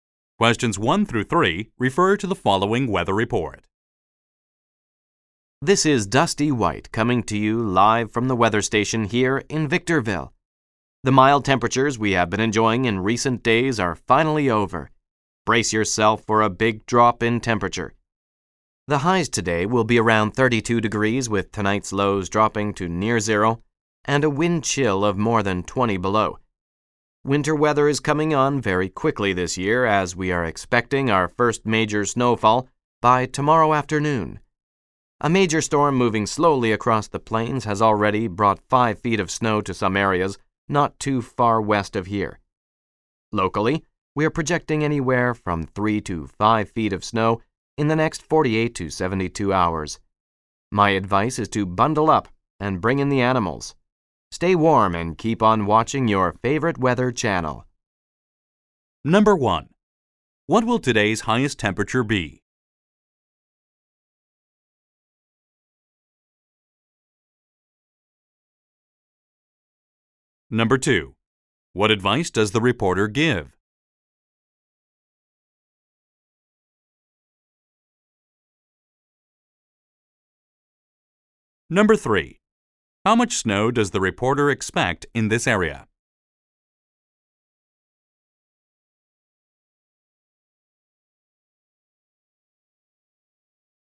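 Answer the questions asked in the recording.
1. Around 32 degrees
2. Bundle up and bring in the animals
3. 3 to 5 feet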